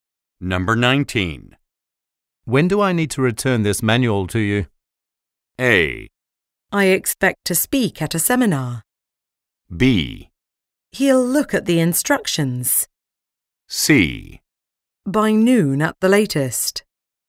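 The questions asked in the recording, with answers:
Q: When do I need to return this manual to you?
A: C: By noon at the latest.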